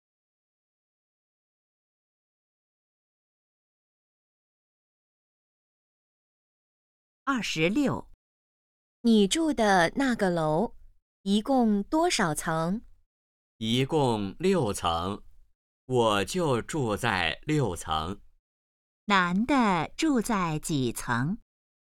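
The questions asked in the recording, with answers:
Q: 男的住在几层?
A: 6层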